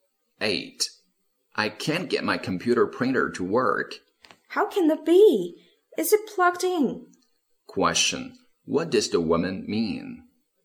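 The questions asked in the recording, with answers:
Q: What does the woman mean?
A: The printer may not be plugged in.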